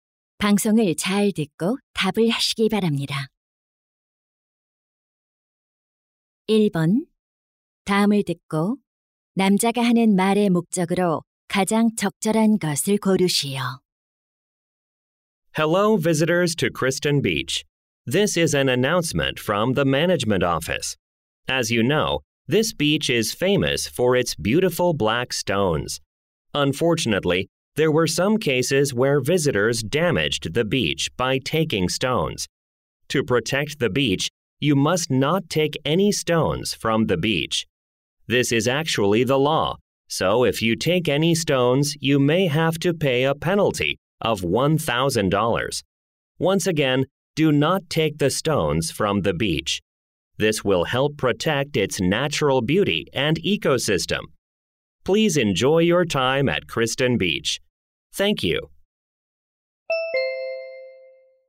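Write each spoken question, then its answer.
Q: 다음을 듣고 남자가 하는 말의 목적으로 가장 적절한 것을 고르시오.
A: 해변의 돌을 가져가지 말라고 당부하려고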